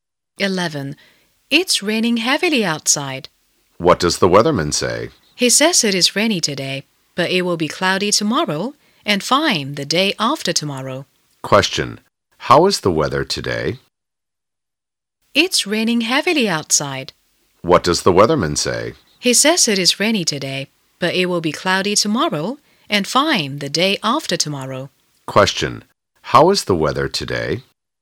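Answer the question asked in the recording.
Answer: Rainy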